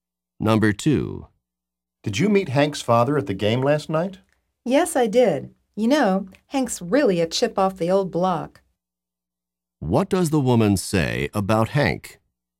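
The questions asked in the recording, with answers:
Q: What does the woman say about Hank?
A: He is very similar to his father.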